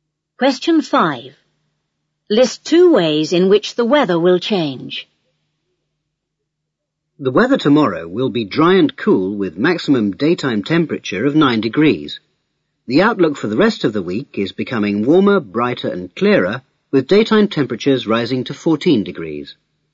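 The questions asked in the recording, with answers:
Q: List two ways in which the weather will change.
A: It will become warmer and brighter/clearer (up to 14 degrees)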